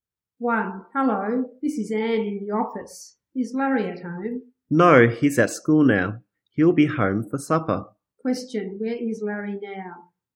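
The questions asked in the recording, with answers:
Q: where is Larry now?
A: At school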